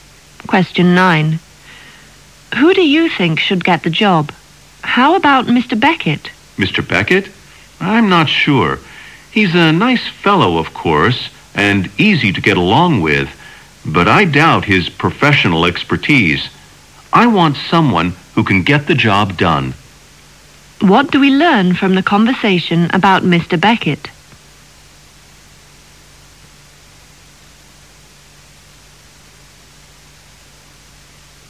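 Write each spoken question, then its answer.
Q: What do we learn from the conversation about Mr.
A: He is nice and easy to get along with but may lack professional expertise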